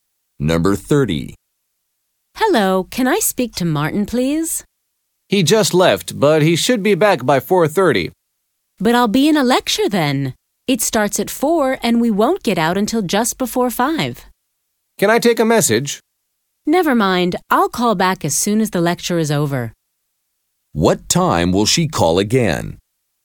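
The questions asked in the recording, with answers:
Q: What time will she call again?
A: Just before 5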